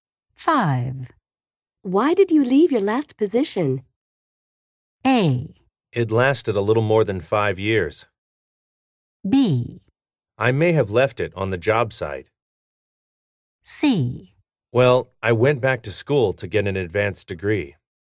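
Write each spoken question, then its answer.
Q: Why did you leave your last position?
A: C: Well, I went back to school to get an advanced degree.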